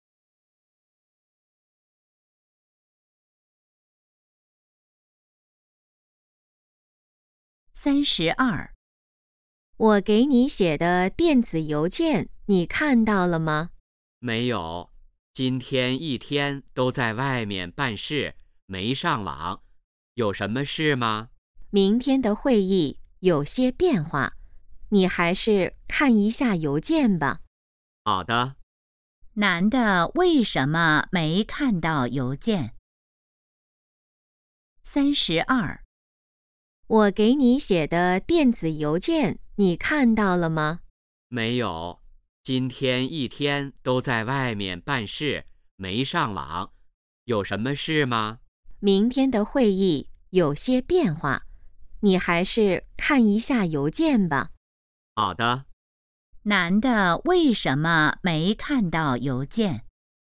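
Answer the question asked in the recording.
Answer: 在外面办事,没上网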